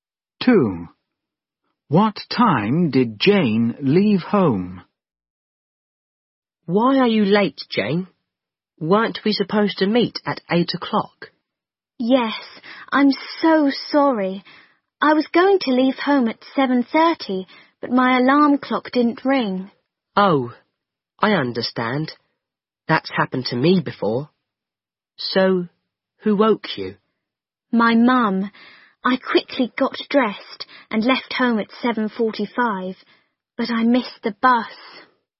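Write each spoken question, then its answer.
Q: What time did Jane leave home?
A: At 7:45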